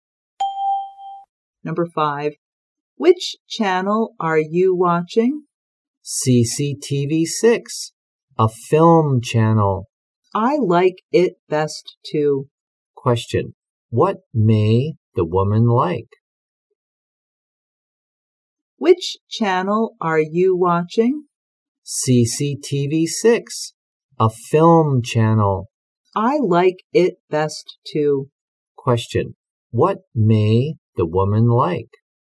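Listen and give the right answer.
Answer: Films (the film channel, CCTV 6)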